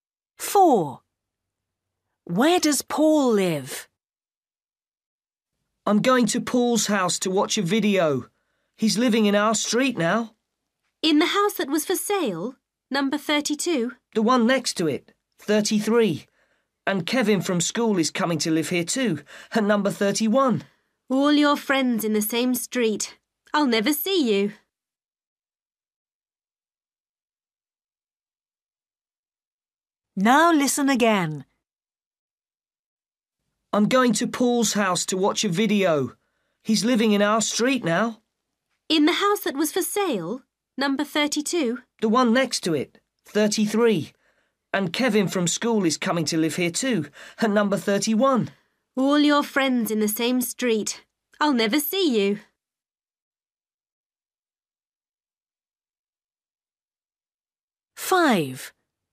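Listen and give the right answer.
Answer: Number 33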